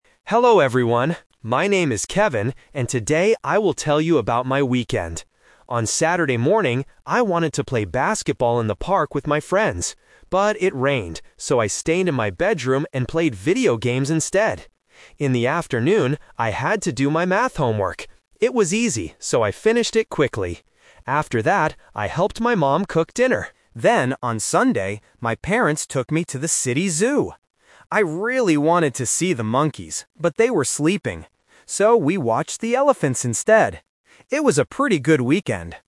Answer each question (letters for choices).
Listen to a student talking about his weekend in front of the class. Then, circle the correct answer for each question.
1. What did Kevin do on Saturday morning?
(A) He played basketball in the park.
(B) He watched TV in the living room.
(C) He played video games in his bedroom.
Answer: C

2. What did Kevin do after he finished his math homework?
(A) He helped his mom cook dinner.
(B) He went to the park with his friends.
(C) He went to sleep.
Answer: A

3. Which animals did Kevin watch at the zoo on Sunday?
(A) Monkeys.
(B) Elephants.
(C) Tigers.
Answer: B

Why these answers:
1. Kevin says, "But it rained, so I stayed in my bedroom and played video games instead." Option (A) is the trap; he wanted to play basketball, but the rain changed his plan. Option (B) is never mentioned.
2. Kevin states clearly, "I finished it [the homework] quickly. After that, I helped my mom cook dinner." Option (B) is a distracter using the word "park" from earlier in the text. Option (C) is a trap using the word "sleep" which appears later in the story.
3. Kevin says, "So, we watched the elephants instead." Option (A) is the trap (The Twist); he wanted to see the monkeys, but he couldn't because they were sleeping. Option (C) is a plausible zoo animal but is not mentioned in the audio.

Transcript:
Kevin: Hello everyone. My name is Kevin, and today I will tell you about my weekend. On Saturday morning, I wanted to play basketball in the park with my friends. But it rained, so I stayed in my bedroom and played video games instead. In the afternoon, I had to do my math homework. It was easy, so I finished it quickly. After that, I helped my mom cook dinner. Then, on Sunday, my parents took me to the city zoo. I really wanted to see the monkeys, but they were sleeping. So, we watched the elephants instead. It was a pretty good weekend!